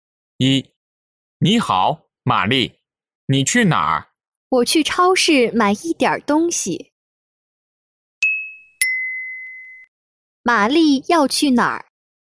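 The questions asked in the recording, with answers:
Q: 玛丽要去哪儿?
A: 去超市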